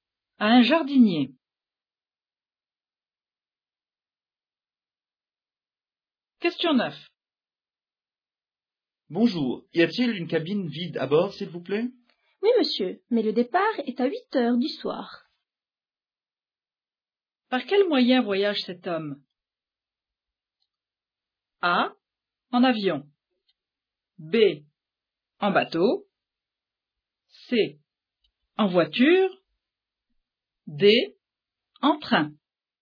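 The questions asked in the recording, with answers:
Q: Par quel moyen voyage cet homme?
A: B: En bateau.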